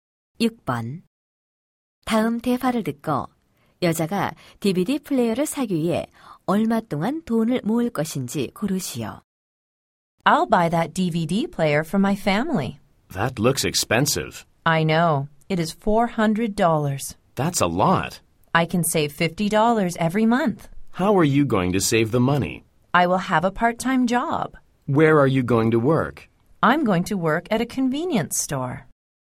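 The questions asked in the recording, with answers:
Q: 다음 대화를 듣고 여자가 DVD 플레이어를 사기 위해 얼마 동안 돈을 모을 것인지 고르시오.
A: 8개월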